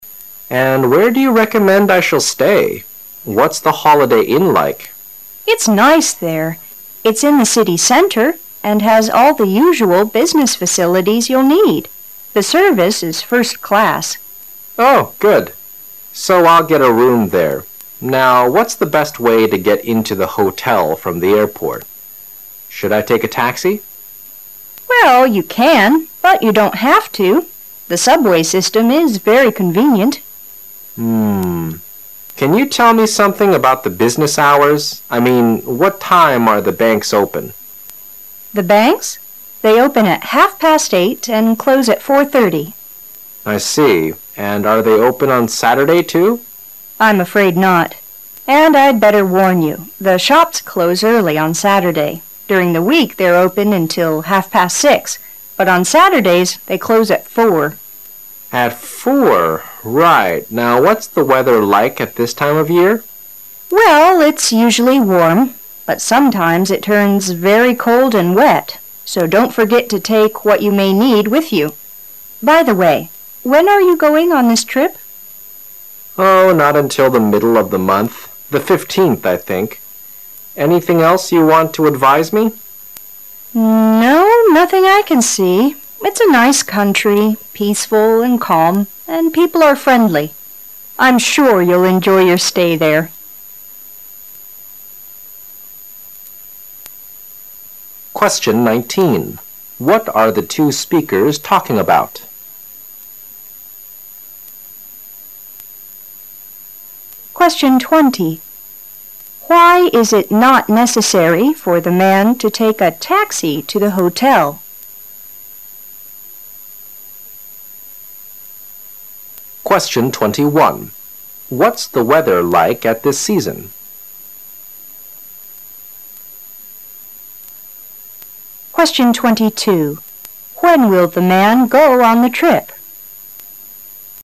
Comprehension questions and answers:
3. What's the weather like at this season?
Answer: Usually warm but sometimes very cold and wet.

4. When will the man go on the trip?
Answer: By the 15th of this month.

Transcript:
[解析] 19-22 M: .., And where do you recommend I shall stay? What's the Holiday Inn like? W: Ifs nice there. It's in the city centre and has all the usual business facilities you'll need. The service is first class. M: Oh, good. So I'll get a room there. Now, what's the best way to get into the hotel from the airport? Should I take a taxi? Well, you can, but you don't have to. The subway; system is very convenient. , Can you tell me something about the business hours? I mean, what time are the banks open? W: The banks? M: I see. And are they open on Saturday too? W: I'm afraid not. And I'd better warn you, the shops close early on Saturday. During the week they're open until half past six, but on Saturdays they close al four. Right. Now, what's the weather like at this time of year? W: Well, it's usually warm. But sometimes it turns very cold and wet. So don't forget to take what you may need with you. By the way, when are you going on this trip? M: Oh, not until the middle of the month. The fifteenth, I think. Anything else you want to advise me? W: No, nothing I can see. It's a nice country, peaceful and calm, and people are friendly. I'm sure you'll enjoy your stay there. What are the two speakers talking about?